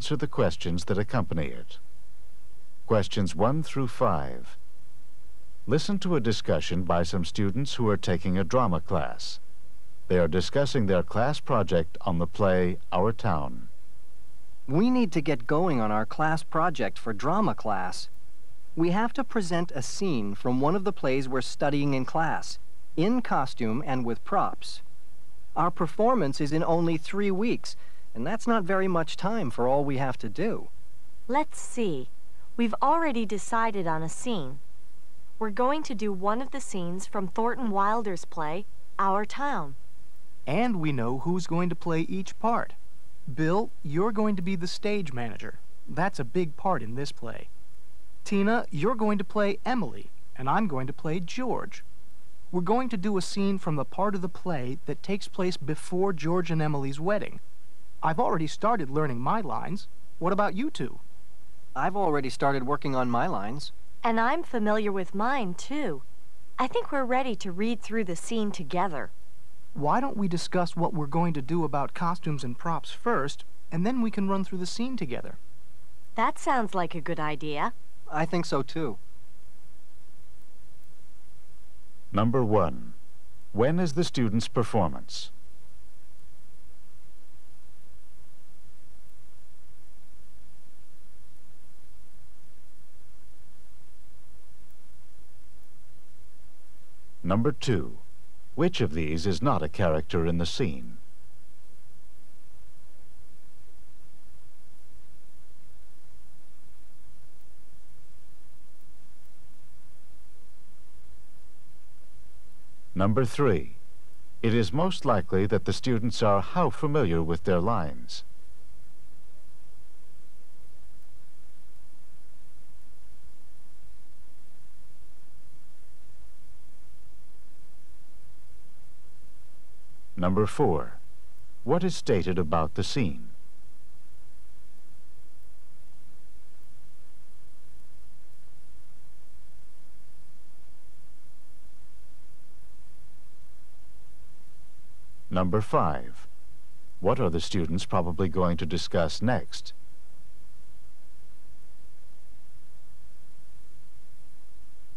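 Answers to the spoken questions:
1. In 3 weeks
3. They have already started learning them
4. It takes place before George and Emily's wedding
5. Costumes and props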